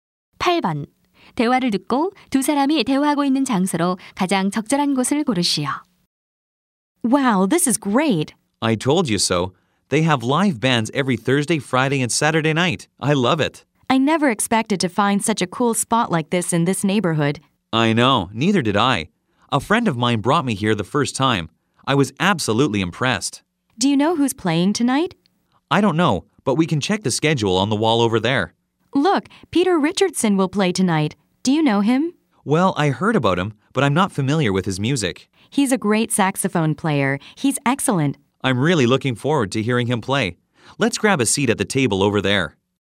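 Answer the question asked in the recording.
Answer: 라이브 음악 클럽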